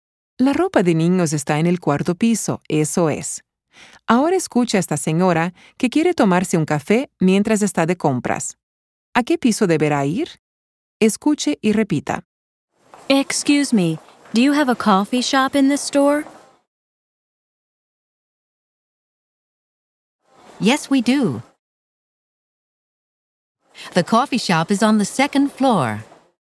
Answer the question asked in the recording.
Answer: La señora tendrá que ir a la cafetería, que se encuentra en el segundo piso.